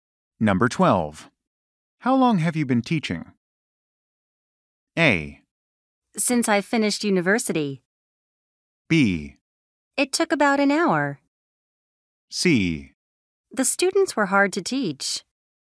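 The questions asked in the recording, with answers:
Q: How long have you been teaching?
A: A: Since I finished university.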